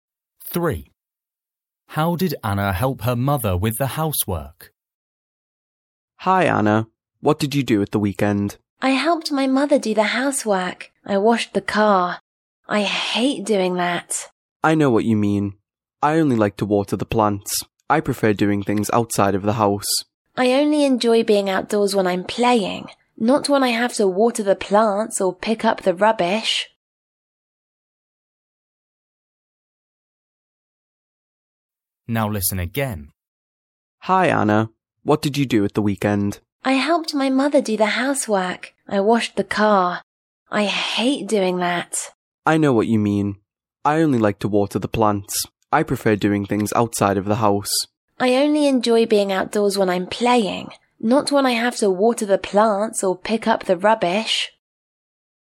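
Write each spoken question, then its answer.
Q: How did Anna help her mother with the housework?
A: She washed the car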